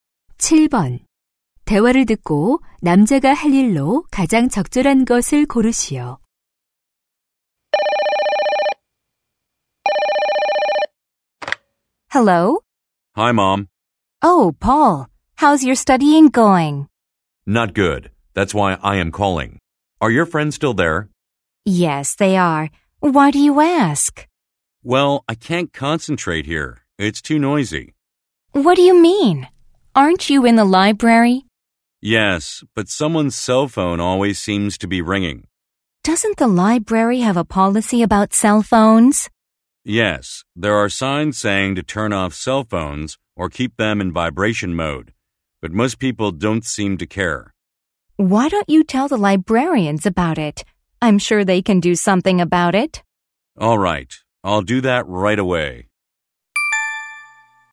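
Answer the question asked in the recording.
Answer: 도서관 사서에게 휴대전화 소음 문제를 알리기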